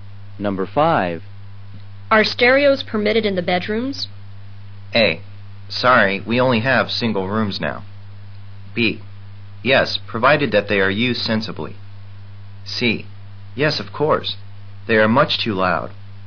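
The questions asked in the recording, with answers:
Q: Are stereos permitted in the bedrooms?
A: B: Yes, provided that they are used sensibly.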